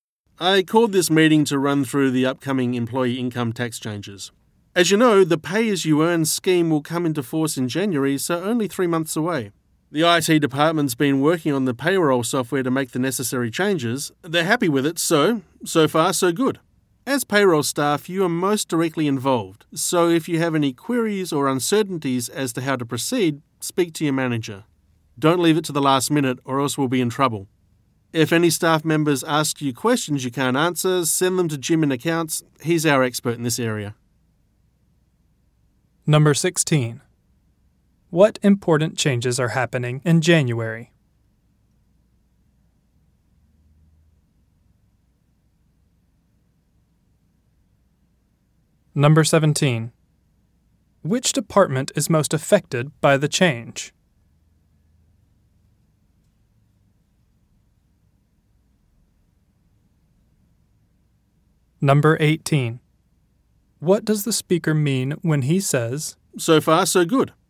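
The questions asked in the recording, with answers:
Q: What important changes are happening in January?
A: The new pay-as-you-earn employee income tax scheme comes into force

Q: Which department is most affected by the change?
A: Payroll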